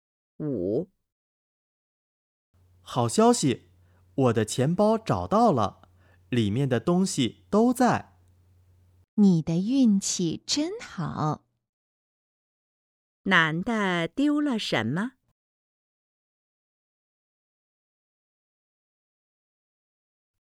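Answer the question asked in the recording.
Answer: 钱包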